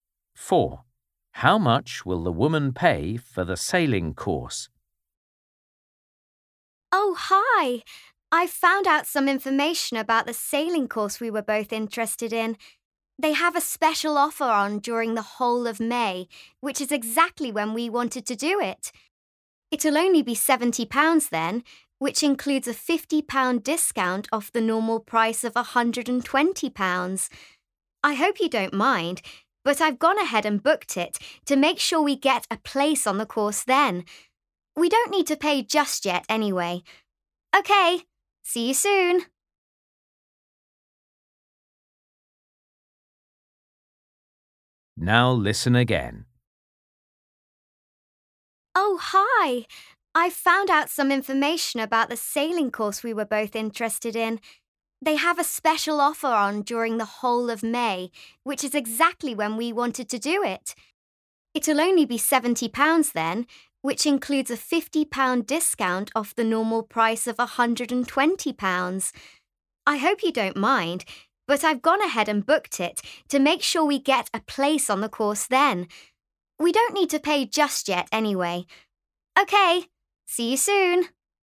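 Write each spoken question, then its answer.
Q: How much will the woman pay for the sailing course?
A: £70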